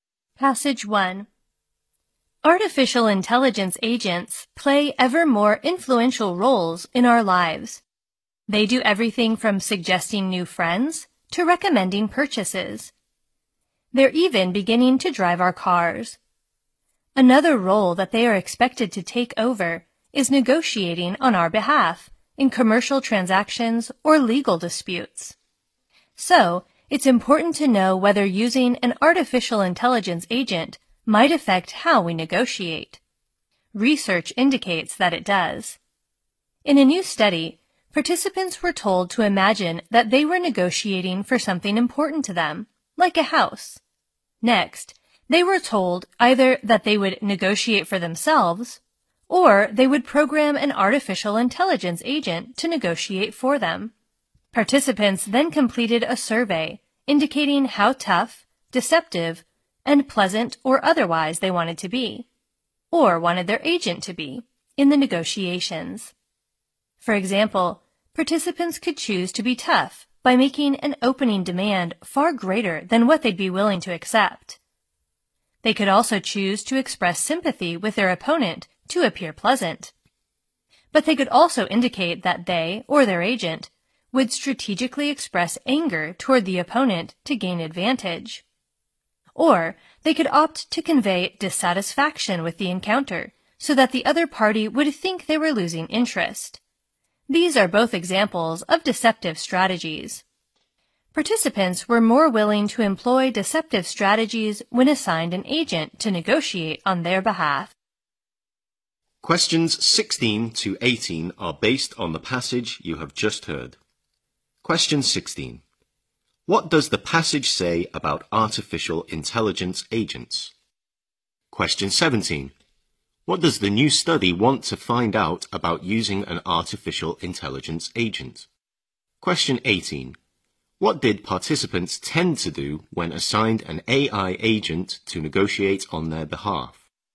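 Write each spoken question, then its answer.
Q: What does the passage say about artificial intelligence agents?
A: They play ever more influential roles in our lives

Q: What does the new study want to find out about using an artificial intelligence agent?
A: Whether it affects how we negotiate

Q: What did participants tend to do when assigned an AI agent to negotiate on their behalf?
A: Be more willing to use deceptive strategies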